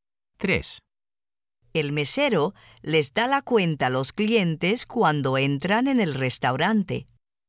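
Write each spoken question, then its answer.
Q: El mesero les da la cuenta a los clientes cuando entran en el restaurante.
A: No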